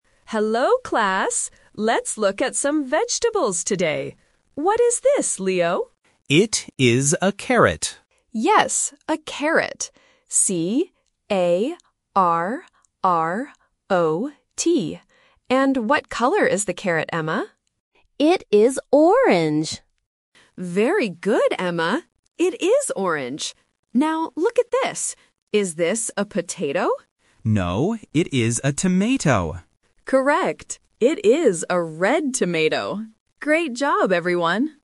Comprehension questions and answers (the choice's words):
Listen to the conversation in a classroom and choose the correct answer (A, B, or C) for each question.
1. What vegetable does the teacher show first?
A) A potato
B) A carrot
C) An onion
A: A carrot

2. How does the teacher spell "carrot"?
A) C-A-R-R-O-T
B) C-A-R-O-T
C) K-A-R-R-O-T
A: C-A-R-R-O-T

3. What color is the tomato?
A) Orange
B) Green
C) Red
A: Red

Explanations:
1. The teacher asks "What is this?" and Leo answers "It is a carrot." Option (A) A potato is The Trap: the teacher mentions it later ("Is this a potato?"), but it is not the first vegetable, and they are actually looking at a tomato at that time. Option (C) An onion is not mentioned in the audio.
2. The teacher clearly spells the word with double R: "C-A-R-R-O-T". Options (B) and (C) are common spelling mistakes.
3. At the end of the conversation, the teacher confirms, "It is a red tomato." Option (A) Orange is The Trap: orange is mentioned, but it is the color of the carrot, not the tomato. Option (B) Green is a plausible color for a tomato, but it is not mentioned in the audio.

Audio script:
Teacher: Hello, class! Let's look at some vegetables today. What is this, Leo?
Leo: It is a carrot.
Teacher: Yes, a carrot. C-A-R-R-O-T. And what color is the carrot, Emma?
Emma: It is orange!
Teacher: Very good, Emma. It is orange. Now, look at this. Is this a potato?
Leo: No, it is a tomato.

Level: A1